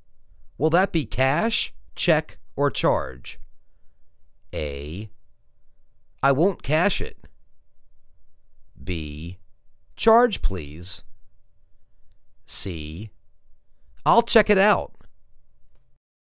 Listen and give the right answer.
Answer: Charge, please.